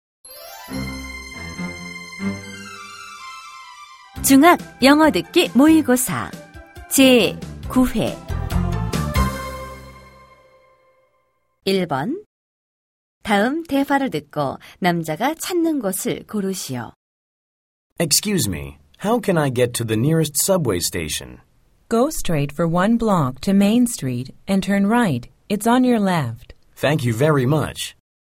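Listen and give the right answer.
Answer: 지하철역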